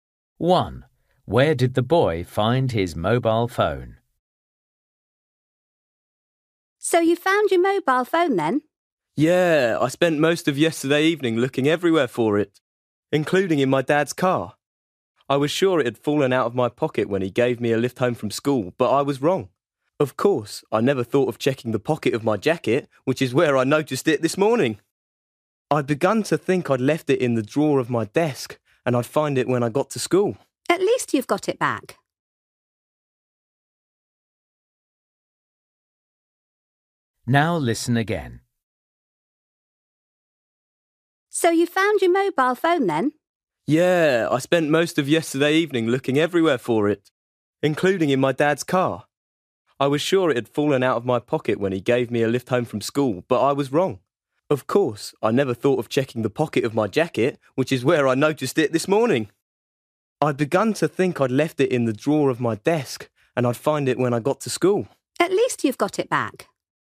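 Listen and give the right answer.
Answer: In his jacket pocket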